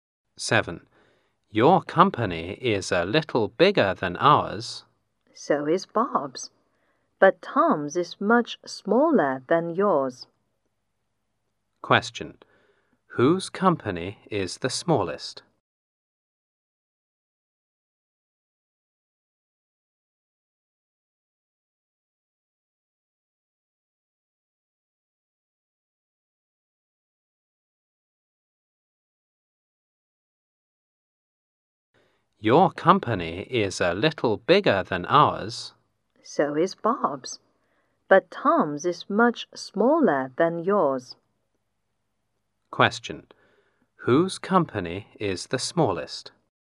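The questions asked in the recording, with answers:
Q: Question. Whose company is the smallest?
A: Tom's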